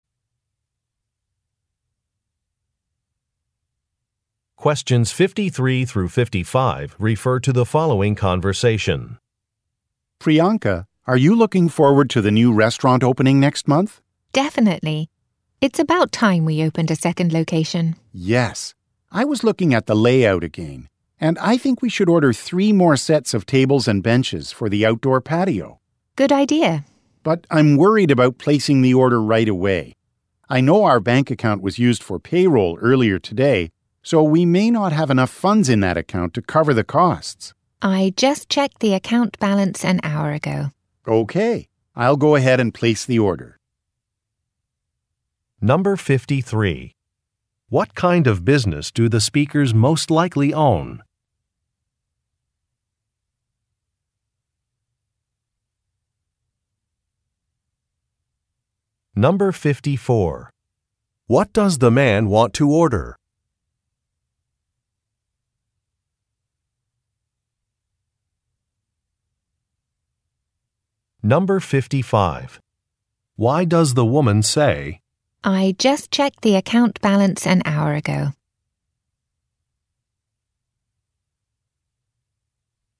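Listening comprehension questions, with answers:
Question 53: What kind of business do the speakers most likely own?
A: A restaurant

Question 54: What does the man want to order?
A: Furniture

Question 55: Why does the woman say. "I just checked the account balance an hour ago"?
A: To provide reassurance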